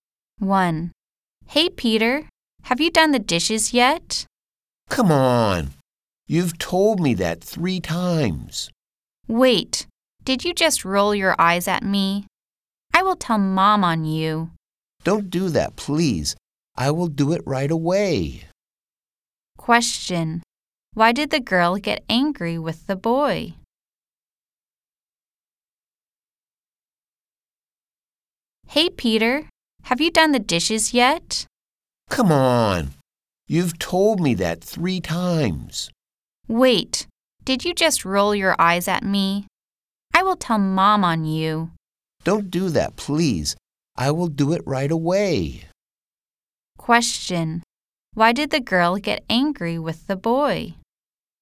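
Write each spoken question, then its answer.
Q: Why did the girl get angry with the boy?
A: He hadn't done the dishes and rolled his eyes at her.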